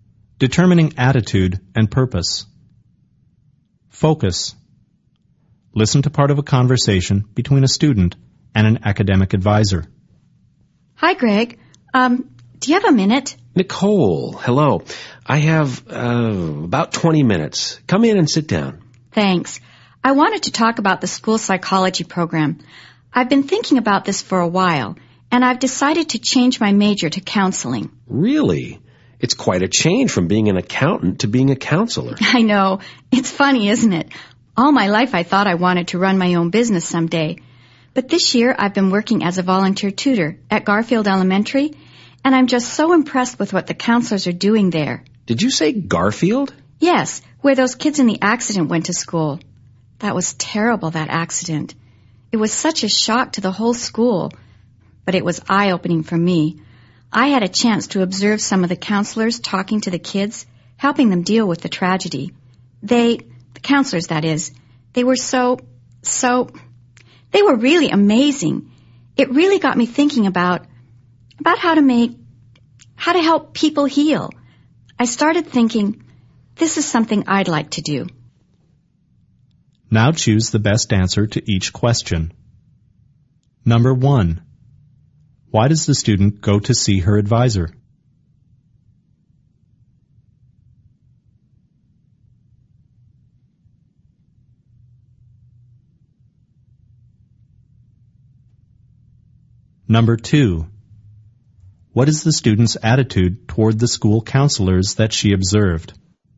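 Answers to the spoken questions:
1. To talk about changing her major to counseling (school psychology)
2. She admires them; she is impressed by them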